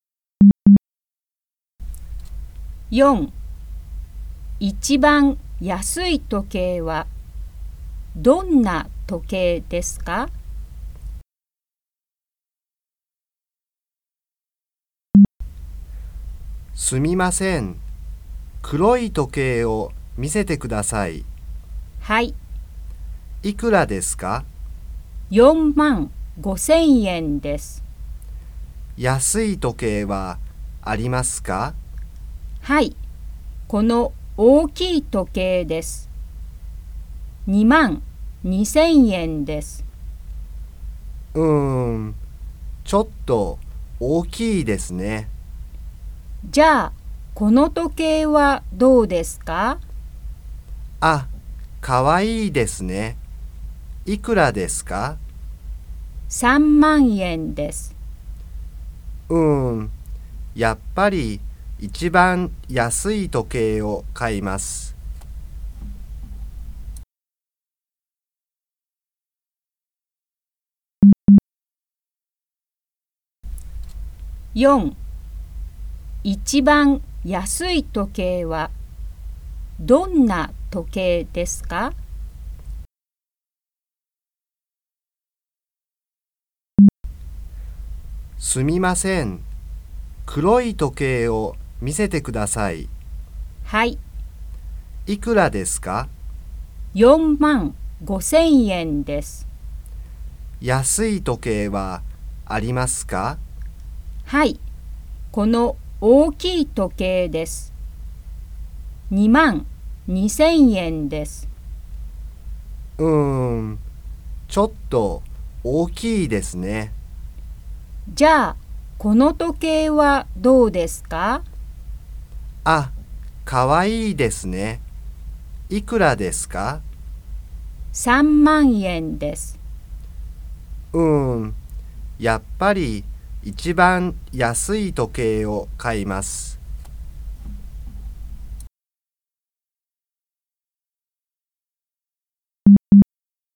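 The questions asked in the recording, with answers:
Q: 一番安い時計はどんな時計ですか?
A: 大きい時計(22,000円)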